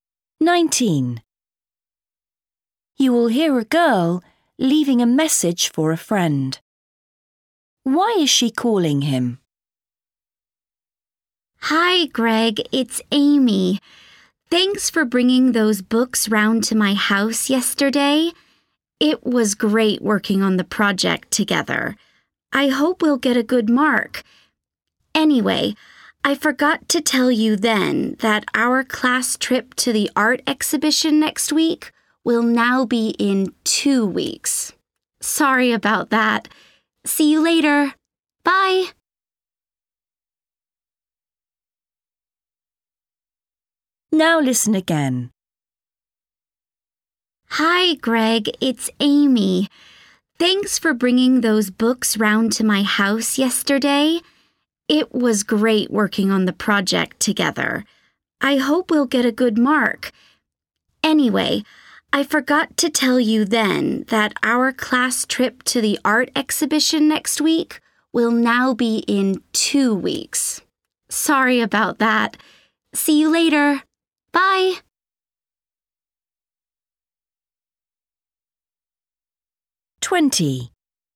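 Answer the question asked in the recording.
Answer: To tell him the class trip has been moved to two weeks later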